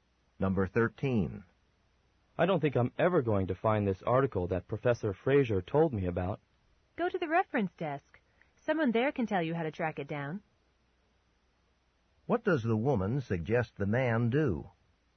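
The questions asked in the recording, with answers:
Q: What does the woman suggest the man do?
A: Ask for help at the reference desk.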